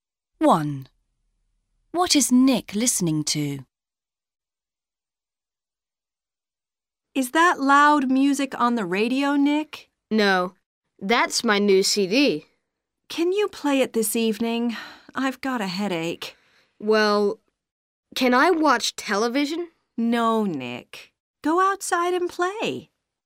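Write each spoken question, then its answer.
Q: What is Nick listening to?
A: his new CD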